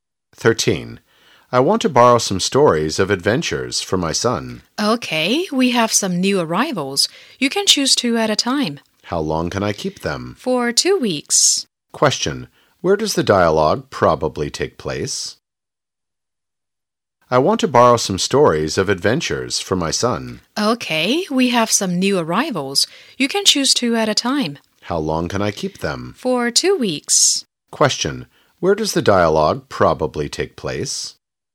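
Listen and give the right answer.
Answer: In a library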